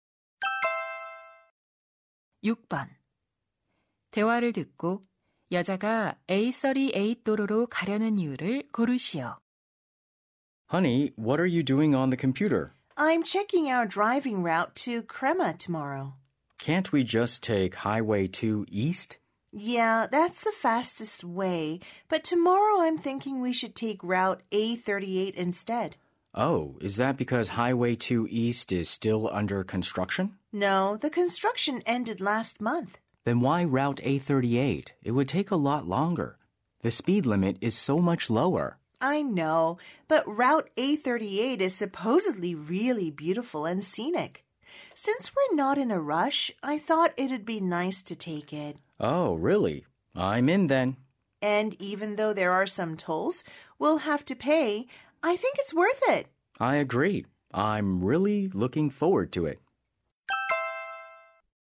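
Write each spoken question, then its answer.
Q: 대화를 듣고 여자가 A38 도로로 가려는 이유를 고르시오.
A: 경치가 아름다워서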